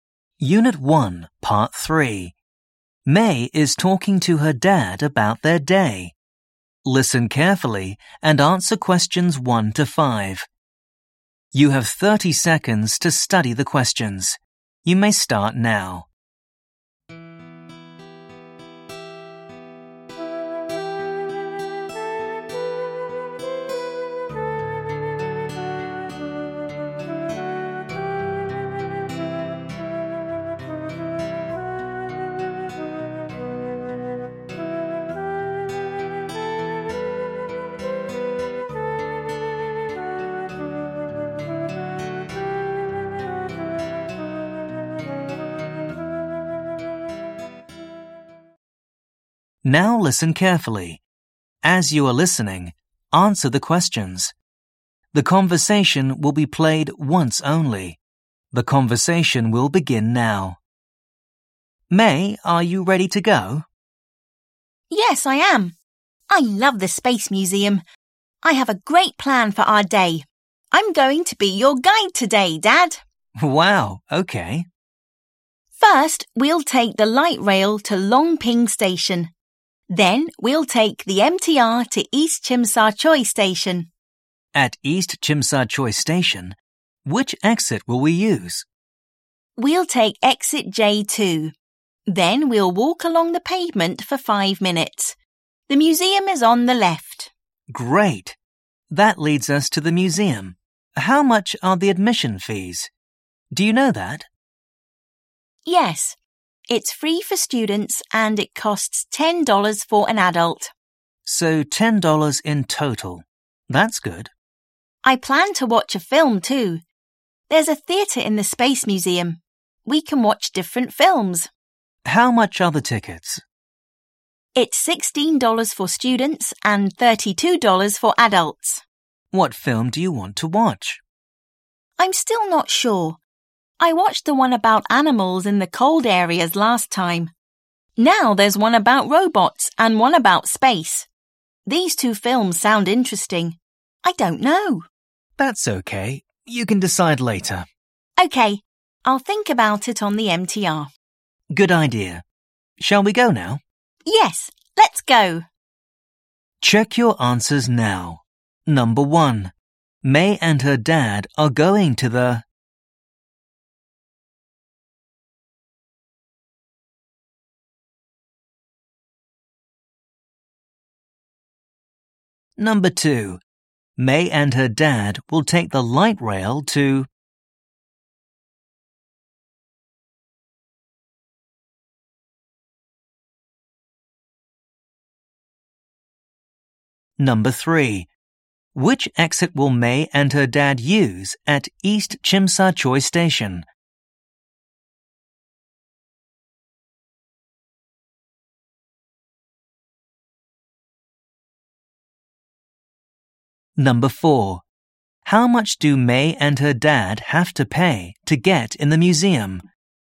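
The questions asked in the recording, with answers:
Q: May and her dad are going to the...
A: Space Museum

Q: May and her dad will take the light rail to...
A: Long Ping Station

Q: Which exit will May and her dad use at East Chim Sa Choi Station?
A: Exit J2

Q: How much do May and her dad have to pay to get in the museum?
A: $10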